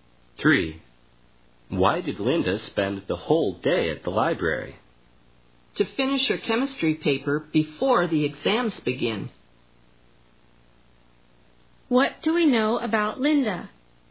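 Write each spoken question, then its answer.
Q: What do we know about Linda?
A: She spent the whole day at the library to finish her chemistry paper before the exams.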